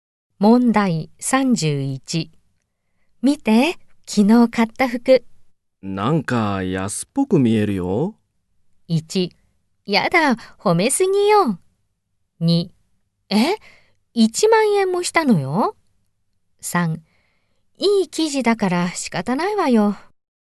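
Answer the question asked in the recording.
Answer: 2: え、1万円もしたのよ。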